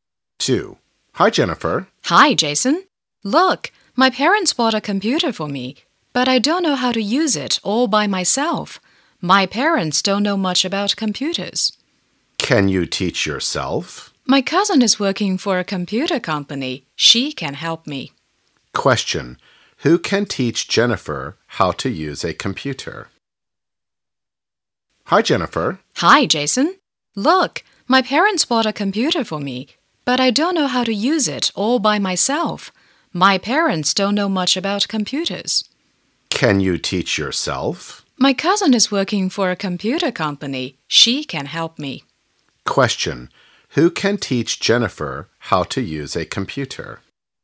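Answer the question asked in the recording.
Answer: Her cousin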